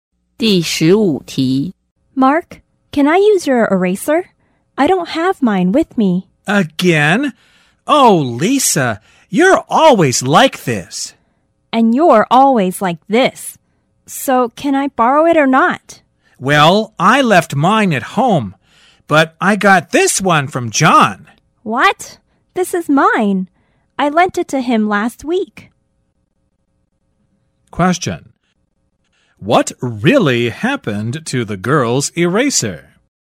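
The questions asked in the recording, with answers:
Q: What really happened to the girl's eraser?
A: She lent it to John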